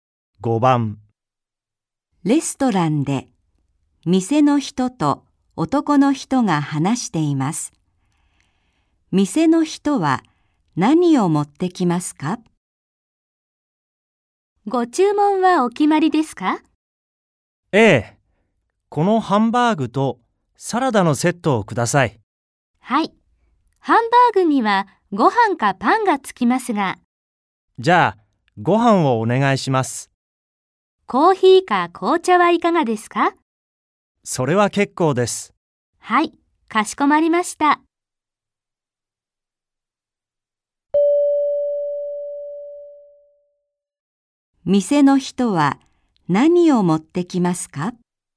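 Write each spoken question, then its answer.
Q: 店の人は何を持ってきますか?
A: ハンバーグとサラダのセットとご飯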